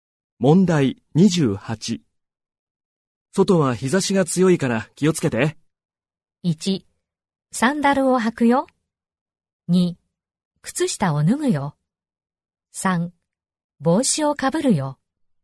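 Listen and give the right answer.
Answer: 3: 帽子をかぶるよ。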